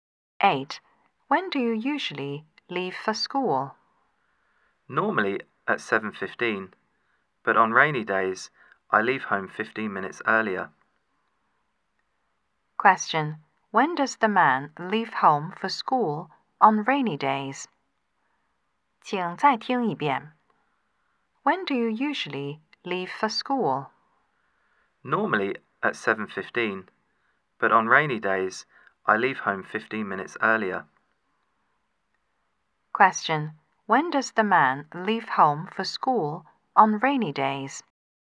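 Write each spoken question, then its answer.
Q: When does the man leave home for school on rainy days?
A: At 7:00.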